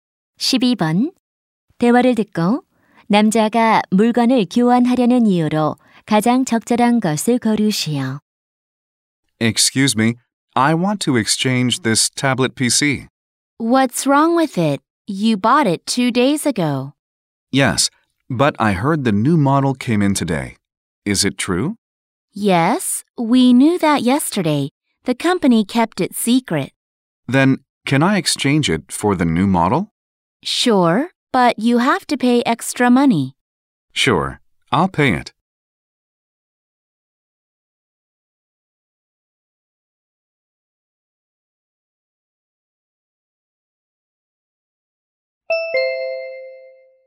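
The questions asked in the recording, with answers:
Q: 대화를 듣고 남자가 물건을 교환하려는 이유로 가장 적절한 것을 고르시오.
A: 새 모델이 나와서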